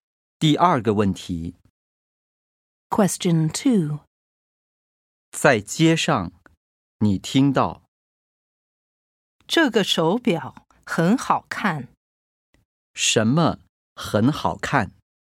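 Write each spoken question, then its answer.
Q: 什么很好看?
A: 这个手表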